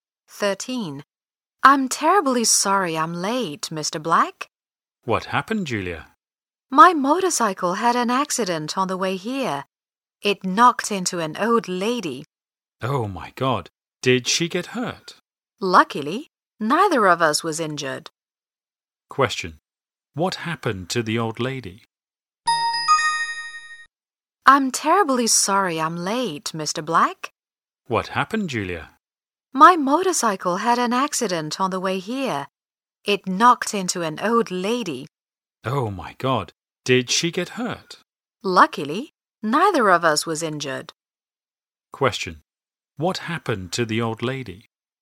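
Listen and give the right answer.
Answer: Julia's motorcycle knocked into her, but she wasn't hurt.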